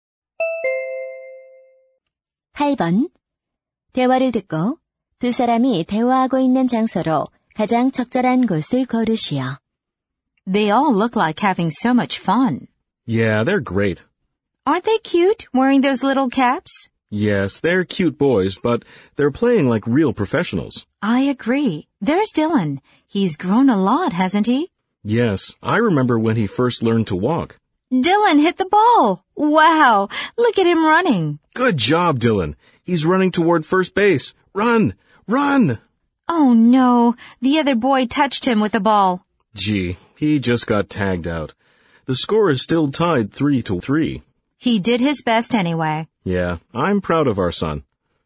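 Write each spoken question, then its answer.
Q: 대화를 듣고 두 사람이 대화하고 있는 장소로 가장 적절한 곳을 고르시오.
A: 야구장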